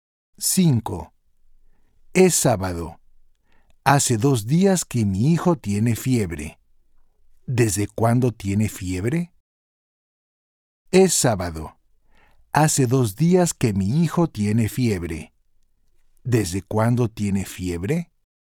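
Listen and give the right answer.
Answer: desde el jueves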